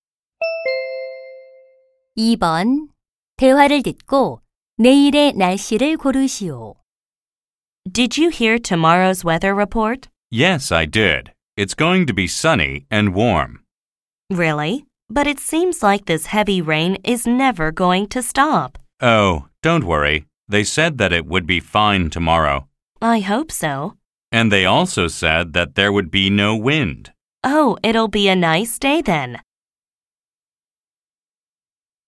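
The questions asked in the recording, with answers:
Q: 대화를 듣고 내일의 날씨를 고르시오.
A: 맑고 따뜻하며 바람이 없음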